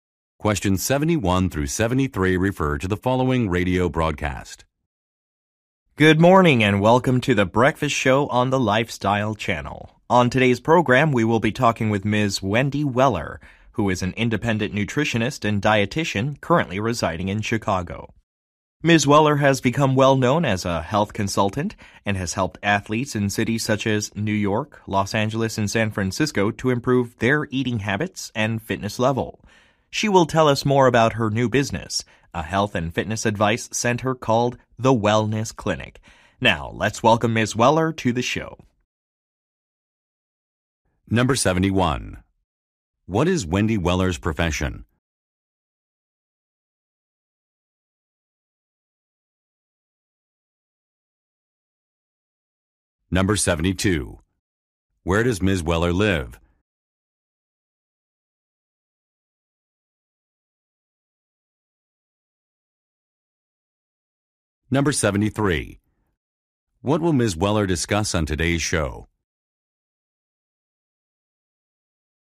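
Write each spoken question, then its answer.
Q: What is Wendy Weller's profession?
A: Nutritionist and dietitian

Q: Where does Ms. Weller live?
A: Chicago

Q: What will Ms. Weller discuss on today's show?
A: Her new business, a health and fitness advice center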